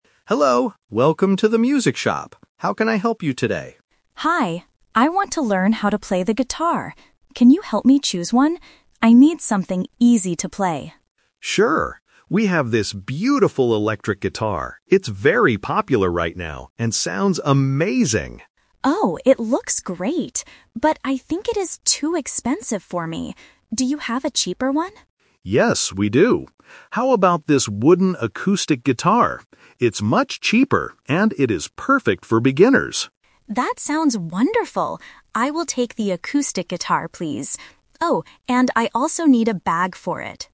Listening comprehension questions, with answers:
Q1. What kind of guitar does the shop assistant show the customer FIRST?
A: An electric guitar.

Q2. Why doesn't the customer buy the first guitar?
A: Because it costs too much money.

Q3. What is the customer going to buy at the end?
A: An acoustic guitar and a bag.

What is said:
Shop Assistant: Hello, welcome to the music shop. How can I help you today?
Customer: Hi. I want to learn how to play the guitar. Can you help me choose one? I need something easy to play.
Shop Assistant: Sure! We have this beautiful electric guitar. It's very popular right now and sounds amazing.
Customer: Oh, it looks great, but I think it is too expensive for me. Do you have a cheaper one?
Shop Assistant: Yes, we do. How about this wooden acoustic guitar? It's much cheaper and it is perfect for beginners.
Customer: That sounds wonderful. I will take the acoustic guitar, please. Oh, and I also need a bag for it.